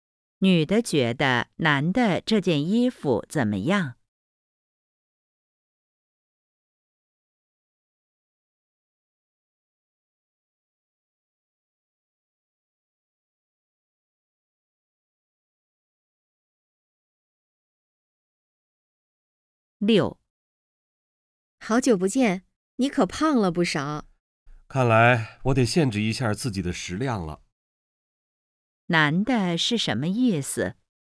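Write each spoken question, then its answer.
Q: 男的是什么意思?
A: 他要控制食量,少吃点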